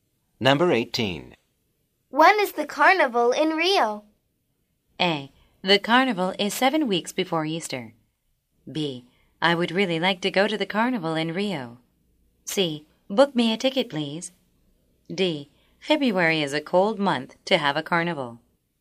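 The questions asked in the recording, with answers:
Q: When is the carnival in Rio?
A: A: The carnival is 7 weeks before Easter.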